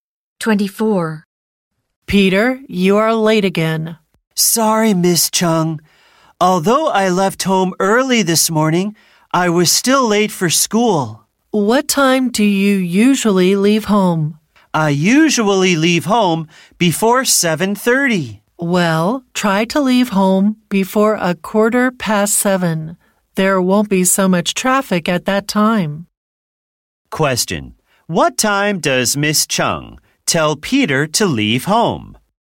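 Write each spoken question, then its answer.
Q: Question, what time does Miss Chung tell Peter to leave home?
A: Before 7:15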